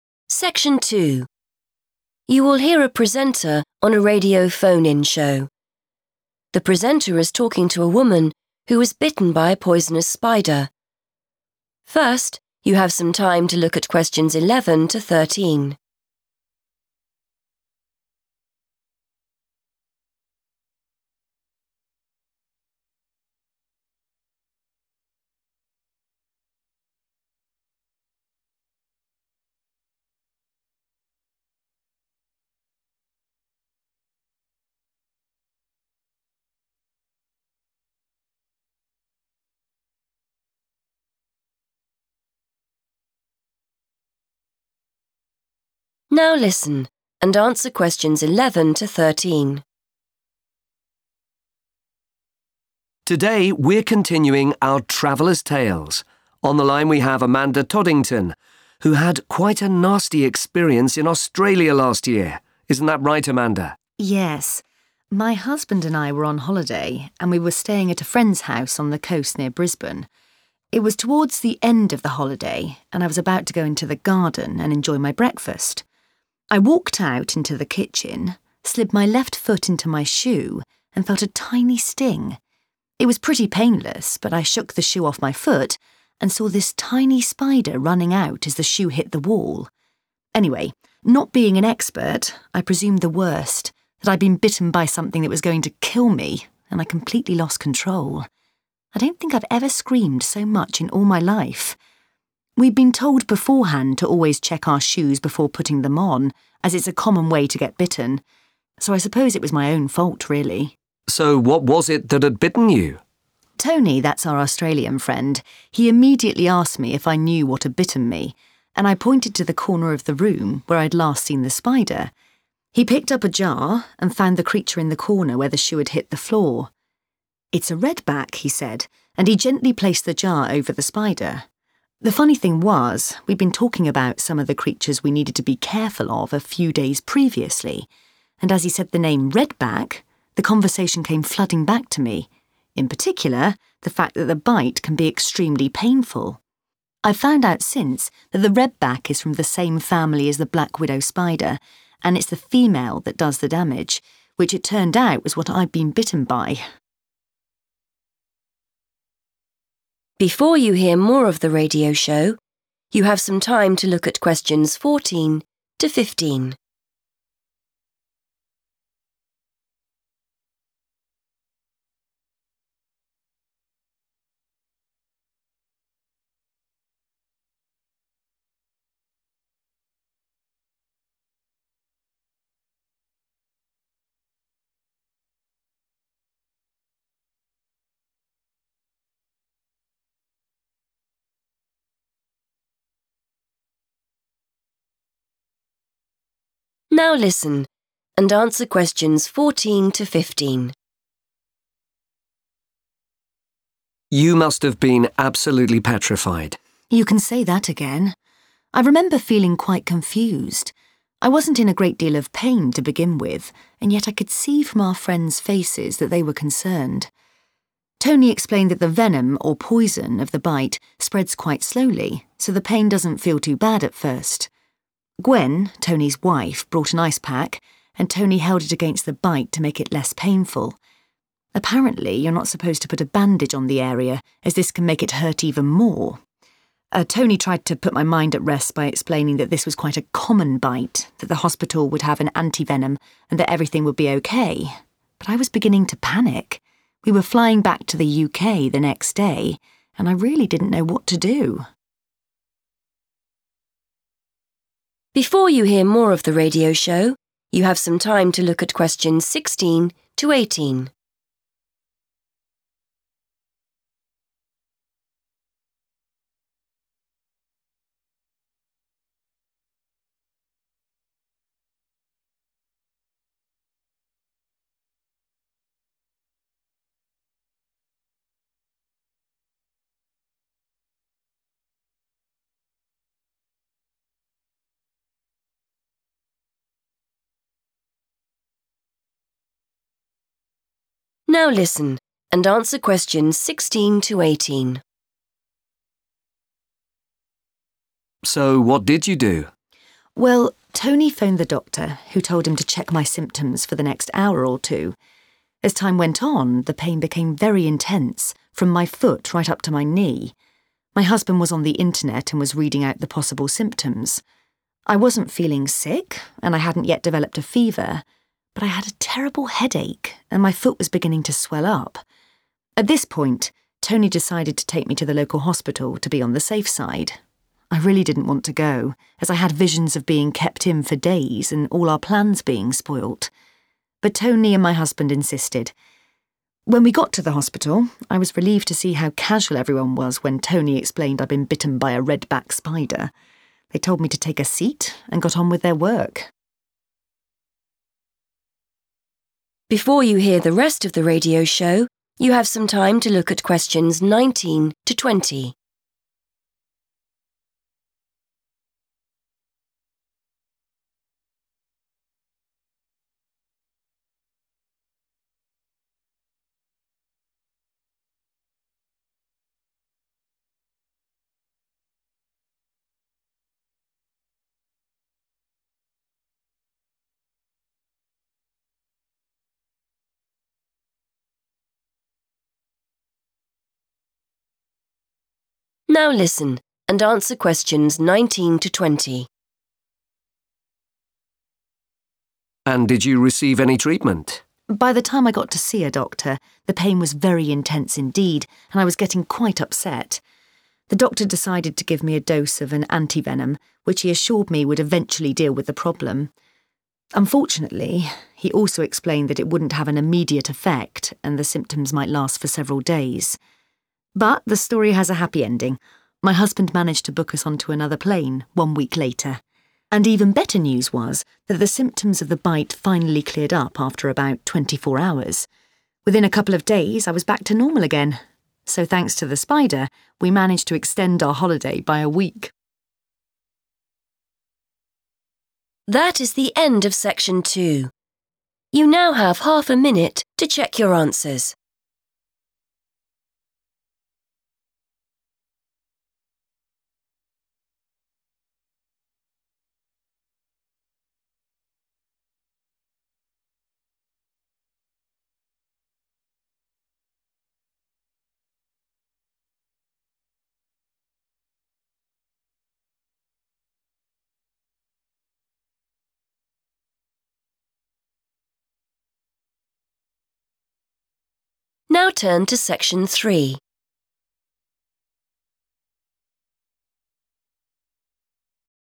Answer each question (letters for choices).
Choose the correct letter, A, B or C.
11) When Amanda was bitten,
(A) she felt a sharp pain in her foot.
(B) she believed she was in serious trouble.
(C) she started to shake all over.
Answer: B

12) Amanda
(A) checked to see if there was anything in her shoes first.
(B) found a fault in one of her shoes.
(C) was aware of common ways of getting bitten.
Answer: C

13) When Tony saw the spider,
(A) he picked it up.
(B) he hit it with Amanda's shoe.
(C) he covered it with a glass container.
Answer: C

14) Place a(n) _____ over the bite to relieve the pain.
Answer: ice pack

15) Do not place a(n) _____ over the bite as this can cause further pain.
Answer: bandage

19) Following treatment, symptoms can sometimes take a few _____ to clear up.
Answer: days

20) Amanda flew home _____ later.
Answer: a week / one week / 1 week

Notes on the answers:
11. The correct answer is choice B because Amanda describes her reaction to the bite as being extremely afraid. She says she 'presumed the worst' and thought the spider was going to 'kill' her. This shows she believed her life was in danger. Choice A is incorrect because she said the bite was 'pretty painless' and felt like a 'tiny sting' at first, not a sharp pain. Choice C is incorrect because she only 'shook' her foot to get the shoe off, rather than her whole body shaking with fear.
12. The correct answer is C because Amanda mentions that she was already warned about spiders in shoes. People told her and her husband earlier that it is a common way for someone to get bitten. This shows she had the knowledge or awareness before the incident happened. Choice A is incorrect because she forgot to check her shoes that day. Choice B is incorrect because 'fault' in the transcript refers to her personal mistake, not a problem with the shoe's construction.
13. The correct answer is C because the text describes how Tony handled the spider after finding it. Instead of touching it with his hands or hitting it, he used a 'jar' (which is a type of glass container) to cover it and keep it safe. Keywords to look for are 'jar' and 'placed over', which correspond to 'covered' and 'glass container' in the choice.
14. The correct answer is supported by the part of the story where Amanda explains what happened right after the spider bite. Her friend Tony used a cold item to help her feel better. In the text, to "make it less painful" means the same thing as the phrase "to relieve the pain" used in the question.
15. The correct answer is "bandage" because the speaker discusses first aid instructions for a spider bite. While an ice pack is used to help the pain feel better, the speaker notes that putting a bandage on the bite is a mistake because it can actually cause more pain or make the situation worse. The word "bandage" directly completes the instruction on what to avoid.
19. The correct answer is 'days' because the doctor at the hospital explained to Amanda that the medicine (anti-venom) she received would not work instantly. He warned her that the effects of the bite, or the symptoms, could continue for 'several' days. In English, 'several' is often used as a synonym for 'a few', which matches the phrasing in the sentence to be completed.
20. The correct answer is based on Amanda's description of her travel arrangements after being bitten by the spider. While they were meant to leave sooner, her husband had to arrange a new flight. She states that they were able to get on a different plane seven days (one week) after their first planned departure. The synonyms "a", "one", and "1" are all accepted ways to describe this single seven-day period.

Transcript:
Presenter: Today we're continuing our travellers' tales. On the line we have Amanda Toddington, who had quite a nasty experience in Australia last year. Isn't that right, Amanda?
Amanda: Yes. My husband and I were on holiday and we were staying at a friend's house on the coast near Brisbane. It was towards the end of the holiday and I was about to go into the garden and enjoy my breakfast. I walked out into the kitchen, slid my left foot into my shoe and felt a tiny sting. It was pretty painless but I shook the shoe off my foot and saw this tiny spider running out as the shoe hit the wall. Anyway, not being an expert, I presumed the worst, that I'd been bitten by something that was going to kill me and I completely lost control. I don't think I've ever screamed so much in all my life. We'd been told beforehand to always check our shoes before putting them on as it's a common way to get bitten, so I suppose it was my own fault, really.
Presenter: So, what was it that had bitten you?
Amanda: Tony - that's our Australian friend - he immediately asked me if I knew what had bitten me, and I pointed to the corner of the room where I'd last seen the spider. He picked up a jar and found the creature in the corner, where the shoe had hit the floor. 'It's a redback,' he said, and he gently placed the jar over the spider. The funny thing was we'd been talking about some of the creatures we needed to be careful of a few days previously, and as he said the name 'redback', the conversation came flooding back to me ... In particular, the fact that the bite can be extremely painful. I've found out since that the redback is from the same family as the black widow spider, and it's the female that does the damage - which it turned out was what I'd been bitten by.
Presenter: You must have been absolutely petrified.
Amanda: You can say that again! I remember feeling quite confused. I wasn't in a great deal of pain to begin with, and yet I could see from our friends' faces that they were concerned. Tony explained that the venom, or poison, of the bite spreads quite slowly, so the pain doesn't feel too bad at first. Gwen - Tony's wife - brought an ice pack and Tony held it against the bite to make it less painful. Apparently, you're not supposed to put a bandage on the area as this can make it hurt even more. Tony tried to put my mind at rest by explaining that this was quite a common bite, that the hospital would have an anti-venom and that everything would be OK. But I was beginning to panic. We were flying back to the UK the next day and I really didn't know what to do.
Presenter: So what did you do?
Amanda: Well, Tony phoned the doctor, who told him to check my symptoms for the next hour or two. As time went on, the pain became very intense, from my foot right up to my knee. My husband was on the internet and was reading out the possible symptoms. I wasn't feeling sick and I hadn't yet developed a fever but I had a terrible headache and my foot was beginning to swell up. At this point, Tony decided to take me to the local hospital to be on the safe side. I really didn't want to go as I had visions of being kept in for days and all our plans being spoilt. But Tony and my husband insisted. When we got to the hospital, I was relieved to see how casual everyone was when Tony explained I'd been bitten by a redback spider. They told me to take a seat and got on with their work.
Presenter: And did you receive any treatment?
Amanda: By the time I got to see a doctor, the pain was very intense indeed and I was getting quite upset. The doctor decided to give me a dose of an anti-venom, which he assured me would eventually deal with the problem. Unfortunately, he also explained that it wouldn't have an immediate effect and the symptoms might last for several days. But the story has a happy ending. My husband managed to book us onto another plane one week later. And even better news was that the symptoms of the bite finally cleared up after about 24 hours. Within a couple of days, I was back to normal again. So thanks to the spider, we managed to extend our holiday by a week.